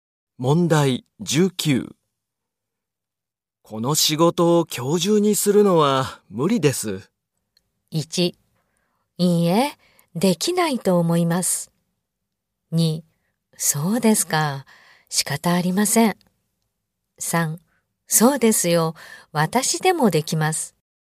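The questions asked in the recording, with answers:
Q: この仕事を今日中にするのは無理です。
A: 2: そうですか、仕方ありません。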